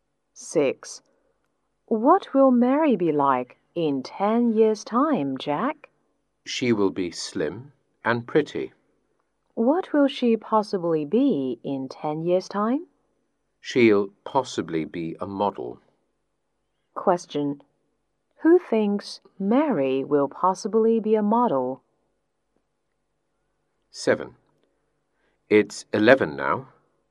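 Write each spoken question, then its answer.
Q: Who thinks Mary will possibly be a model?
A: Jack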